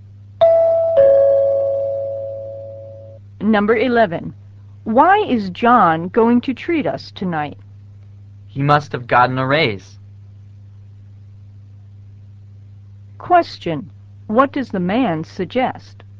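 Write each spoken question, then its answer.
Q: What does the man suggest?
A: John must have gotten a raise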